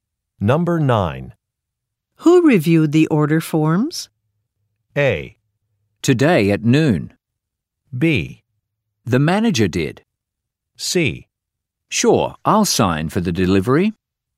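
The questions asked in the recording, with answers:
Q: Who reviewed the order forms?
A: B: The manager did.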